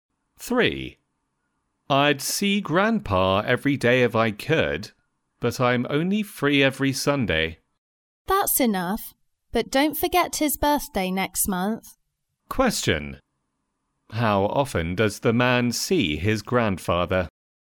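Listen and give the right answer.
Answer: Once a week (every Sunday)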